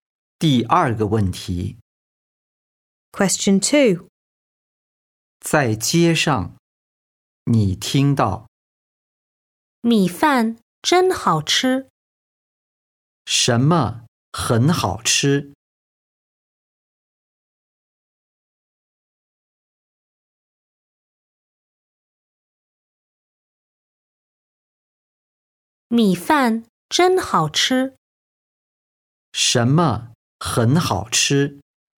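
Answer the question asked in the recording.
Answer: 米饭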